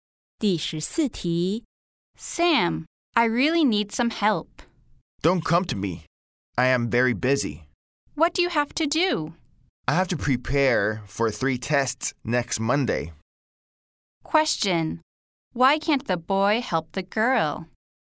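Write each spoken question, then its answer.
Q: Why can't the boy help the girl?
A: He has to prepare for 3 tests next Monday.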